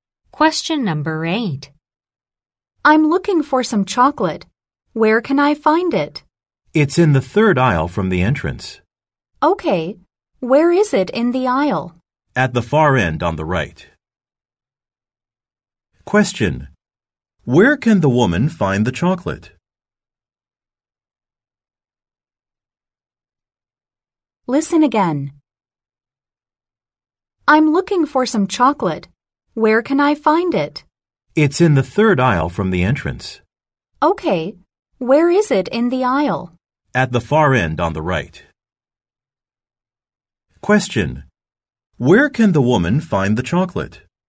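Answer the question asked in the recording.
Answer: In the third aisle from the entrance, at the far end on the right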